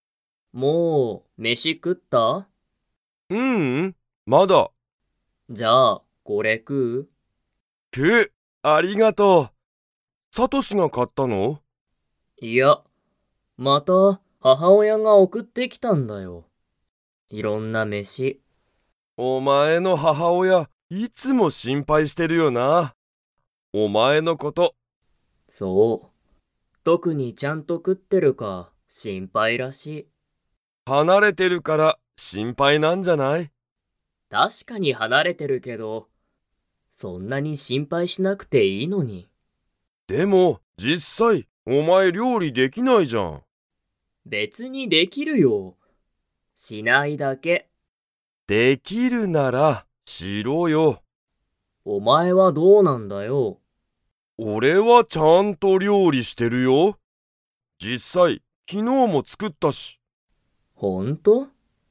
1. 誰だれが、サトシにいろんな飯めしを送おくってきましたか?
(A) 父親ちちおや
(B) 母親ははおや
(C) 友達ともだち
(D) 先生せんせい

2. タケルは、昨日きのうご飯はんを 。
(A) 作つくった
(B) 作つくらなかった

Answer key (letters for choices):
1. B
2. A

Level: Level 3